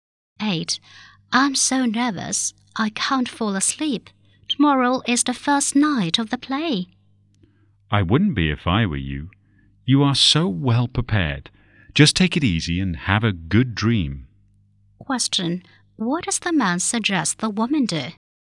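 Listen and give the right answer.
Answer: Relax and go to sleep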